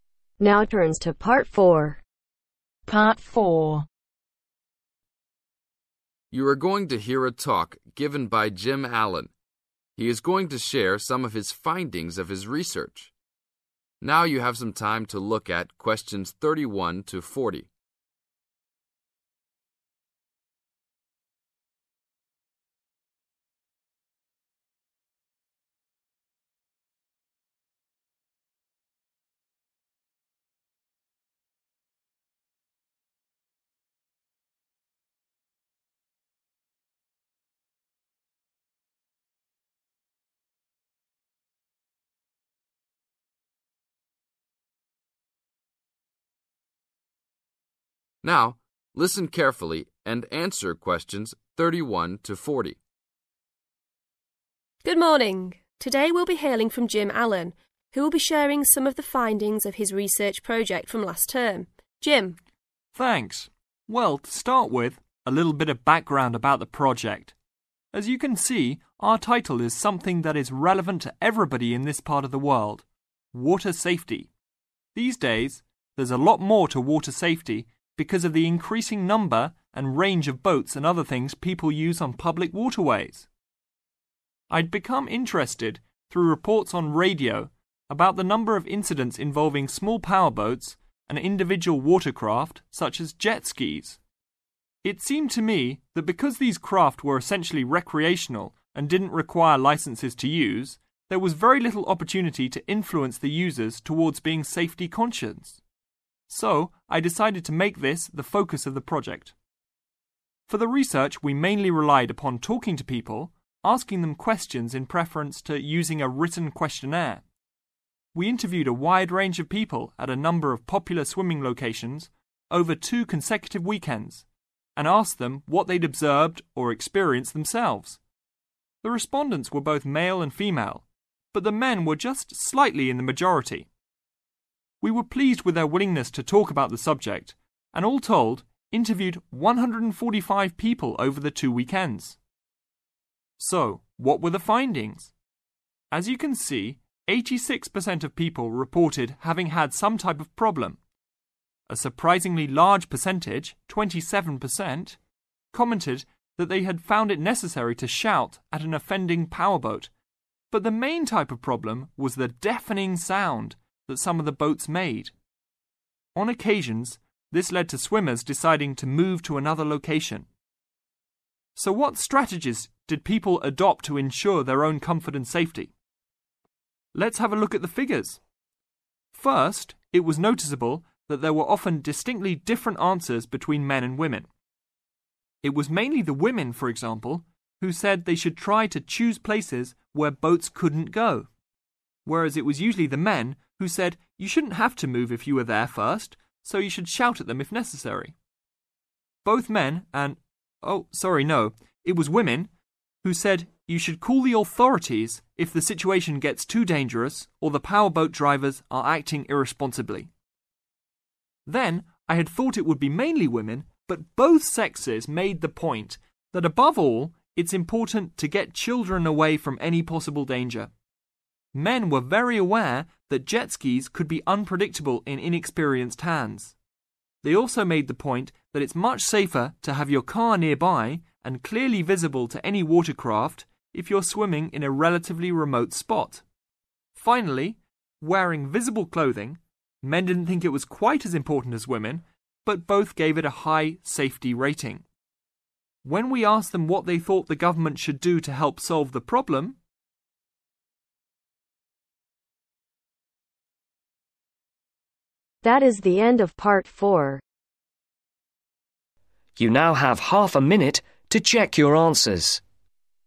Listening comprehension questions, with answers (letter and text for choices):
Circle the correct letter.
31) Jim was first interested in the subject because of something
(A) he had experienced.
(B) he had heard.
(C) he had witnessed.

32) The main research method was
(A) interviews.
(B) observation.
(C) questionnaires.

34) How many respondents were there ?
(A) 50-100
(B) 100-150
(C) 150-200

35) The most common type of problem involved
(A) water movement.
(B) verbal abuse.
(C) noise.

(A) mainly women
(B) mainly men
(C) both men and women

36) Tell them to leave.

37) Contact the police if it gets too serious.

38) Protect the children.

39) When isolated, make sure your car can be seen.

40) Wear bright clothing.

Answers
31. (B) he had heard.
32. (A) interviews.
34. (B) 100-150
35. (C) noise.
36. (B) mainly men
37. (A) mainly women
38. (C) both men and women
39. (B) mainly men
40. (C) both men and women